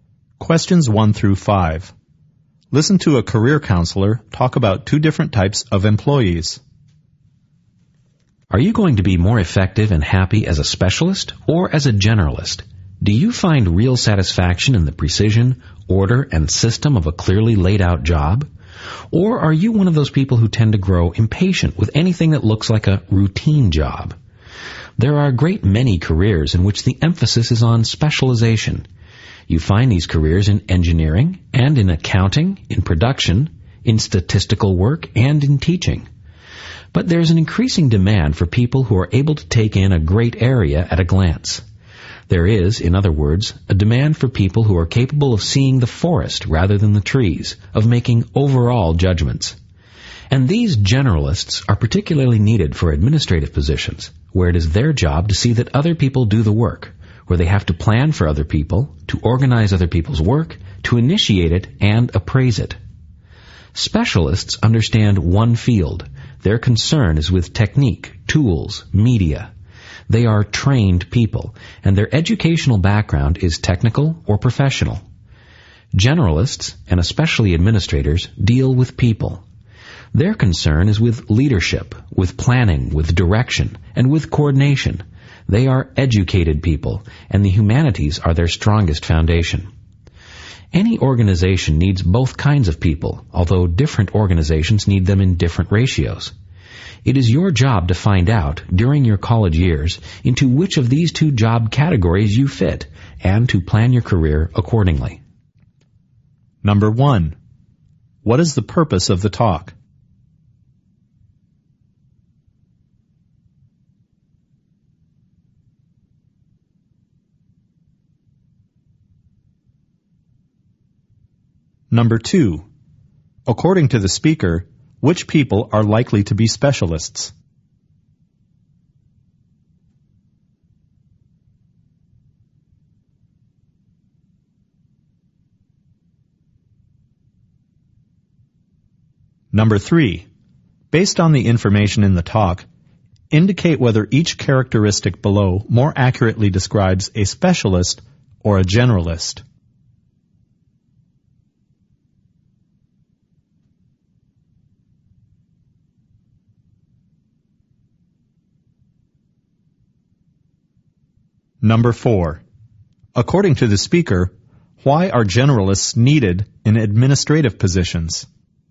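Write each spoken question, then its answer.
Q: What is the purpose of the talk?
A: To help students work out whether they are suited to be specialists or generalists and plan their careers

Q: According to the speaker, which people are likely to be specialists?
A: People in engineering, accounting, production, statistical work and teaching

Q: According to the speaker, why are generalists needed in administrative positions?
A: To see that other people do the work, and to plan and organize other people's work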